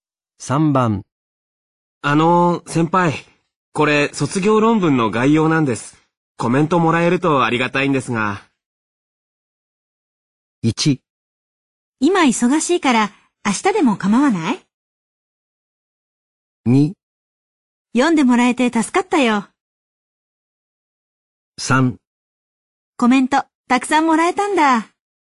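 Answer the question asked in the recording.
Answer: 1: 今忙しいから明日でも構わない?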